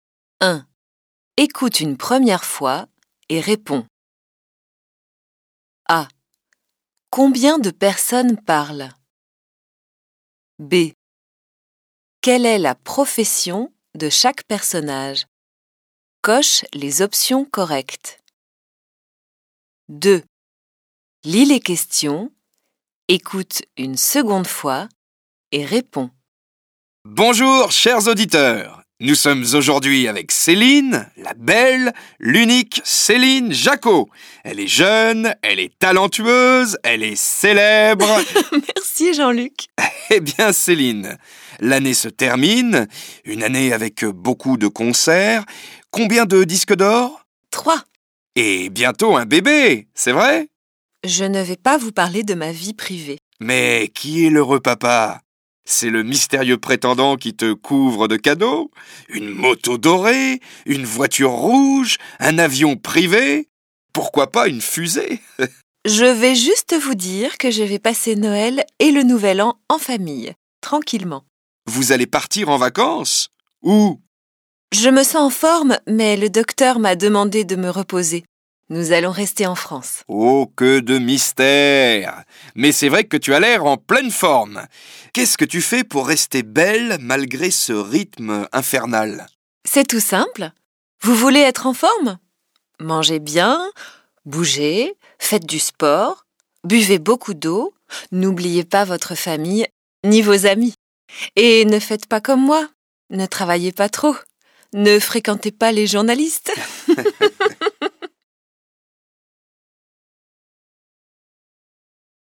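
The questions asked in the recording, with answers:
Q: Combien de personnes parlent?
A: Deux personnes (Jean-Luc et Céline)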